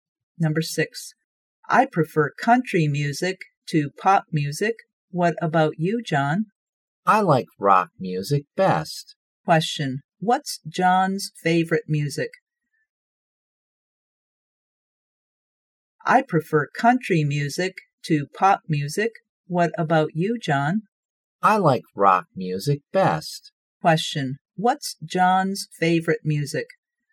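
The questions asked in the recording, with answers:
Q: what's John's favorite music?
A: Rock music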